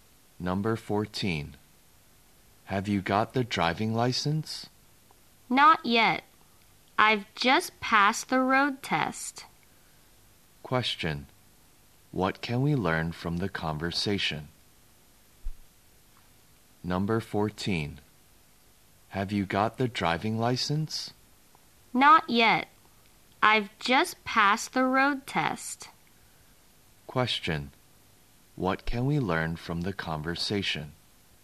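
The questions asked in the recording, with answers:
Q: What can we learn from the conversation?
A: The man has just passed the road test but hasn't got the driving license yet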